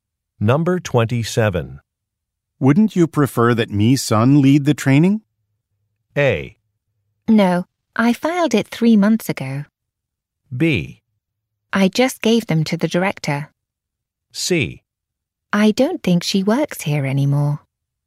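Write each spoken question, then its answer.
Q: Wouldn't you prefer that Mi Sun lead the training?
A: C: I don't think she works here anymore.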